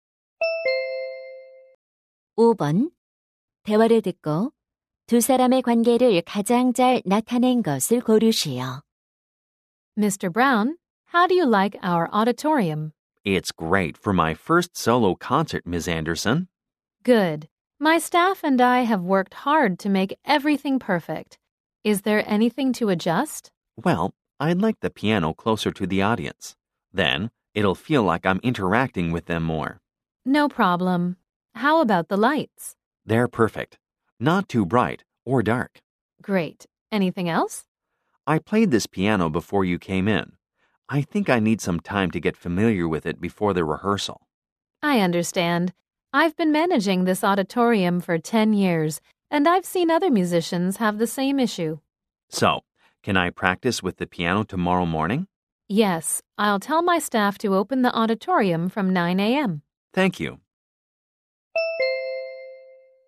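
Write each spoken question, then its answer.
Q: 대화를 듣고 두 사람의 관계를 가장 잘 나타낸 것을 고르시오.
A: 피아니스트 - 공연장 관리자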